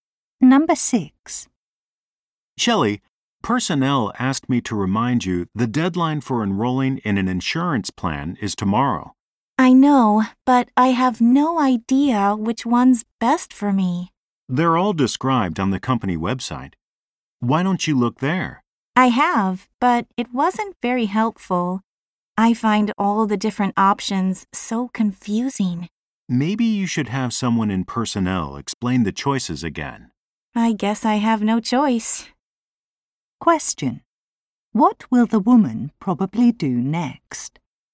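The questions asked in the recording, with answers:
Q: What will the woman probably do next?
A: Ask someone in personnel to explain the insurance options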